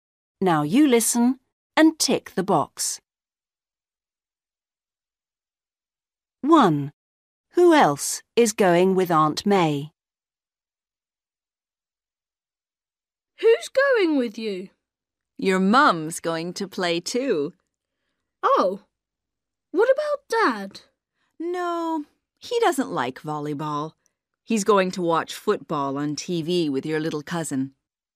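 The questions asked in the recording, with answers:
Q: Who else is going with Aunt May?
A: Tom's mum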